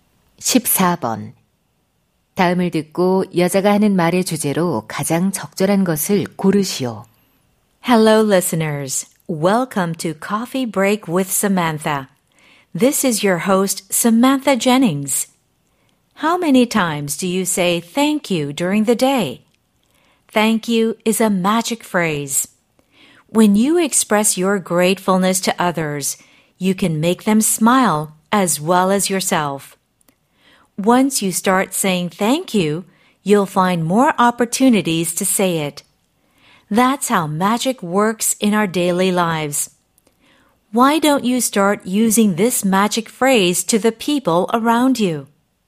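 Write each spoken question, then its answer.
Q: 다음을 듣고 여자가 하는 말의 주제로 가장 적절한 것을 고르시오.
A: 감사하다는 말의 긍정적 효과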